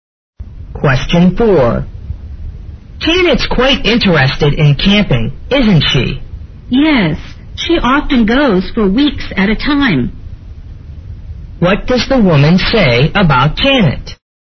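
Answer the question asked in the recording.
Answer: She often goes camping for weeks at a time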